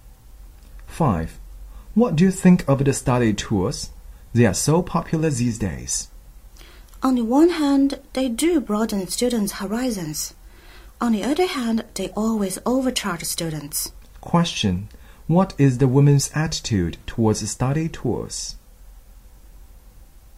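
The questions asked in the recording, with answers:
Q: What is the woman's attitude towards study tours?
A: Mixed: they broaden horizons but overcharge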